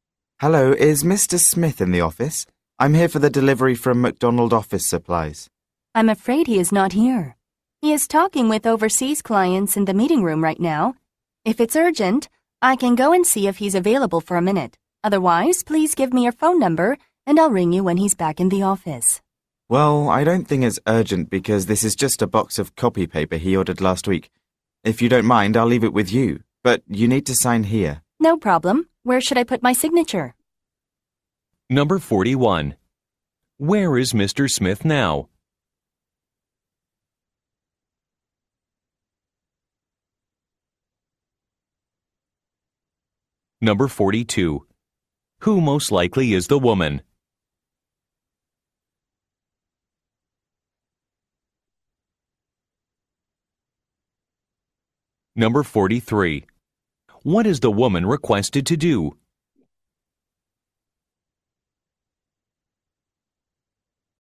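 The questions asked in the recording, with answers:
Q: Where is Mr. Smith now?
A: In the meeting room, talking with overseas clients

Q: What is the woman requested to do?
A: Sign for the delivery of the copy paper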